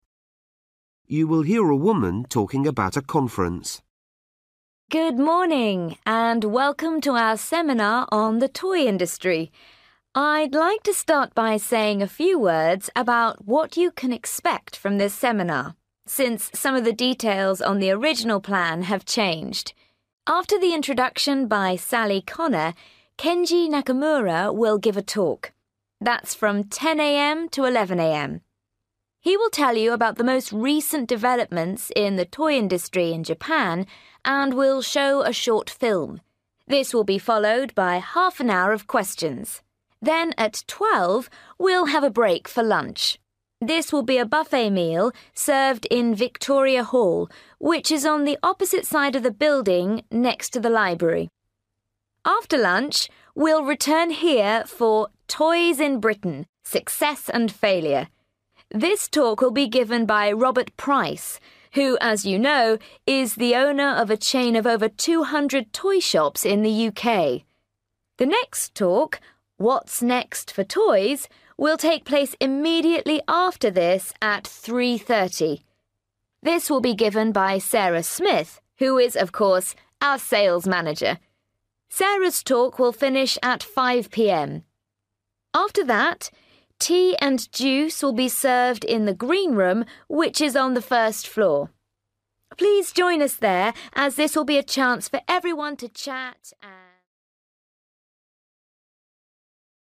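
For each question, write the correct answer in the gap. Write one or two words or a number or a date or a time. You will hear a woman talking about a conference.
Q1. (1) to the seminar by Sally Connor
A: Introduction

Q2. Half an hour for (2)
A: questions

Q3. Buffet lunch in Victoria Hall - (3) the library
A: next to

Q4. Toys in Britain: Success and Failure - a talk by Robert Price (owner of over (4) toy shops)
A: 200

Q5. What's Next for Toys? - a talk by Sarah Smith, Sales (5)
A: Manager

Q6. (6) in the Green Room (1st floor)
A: Tea and juice

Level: Luyện nghe trình độ B1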